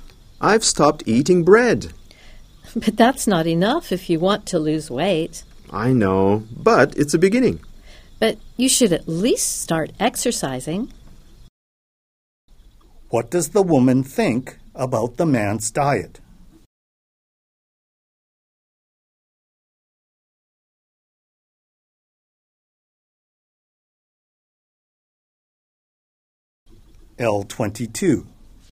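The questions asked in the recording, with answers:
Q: What does the woman think about the man's diet?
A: It's not enough; he should also exercise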